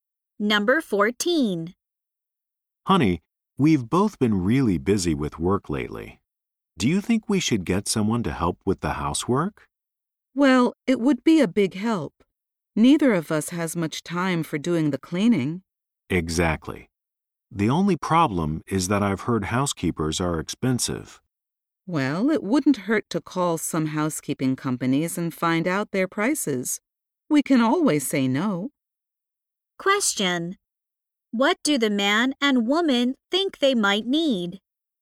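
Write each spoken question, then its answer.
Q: What do the man and woman think they might need?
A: A housekeeper to help with the housework.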